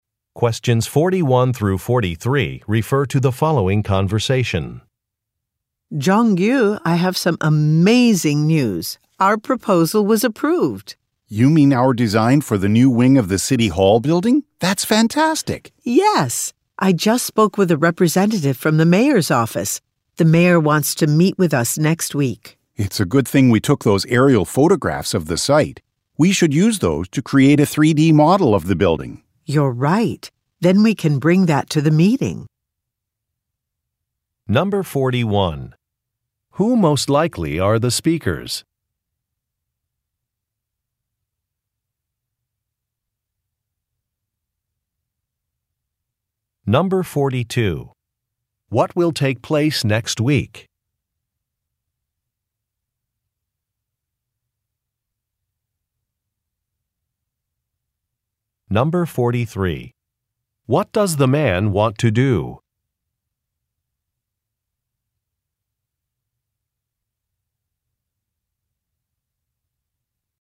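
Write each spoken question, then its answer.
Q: Who most likely are the speakers?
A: Architects

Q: What will take place next week?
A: A meeting with the mayor

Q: What does the man want to do?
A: Create a 3D model of the building using aerial photographs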